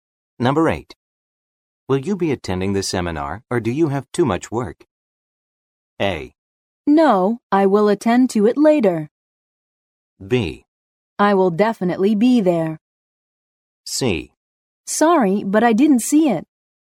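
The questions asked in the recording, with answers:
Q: Will you be attending the seminar, or do you have too much work?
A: B: I will definitely be there.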